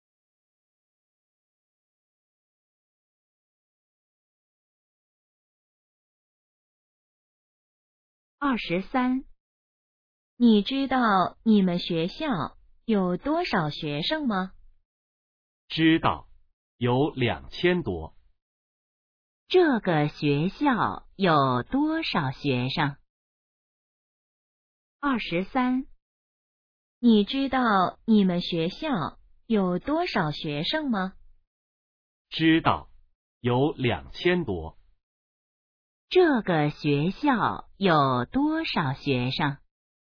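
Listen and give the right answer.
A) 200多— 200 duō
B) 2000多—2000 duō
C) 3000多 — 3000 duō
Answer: B) 2000多—2000 duō

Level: HSK2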